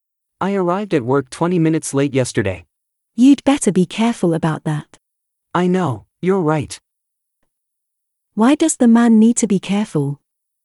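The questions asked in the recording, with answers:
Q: Why does the man need to be careful?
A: He arrived at work late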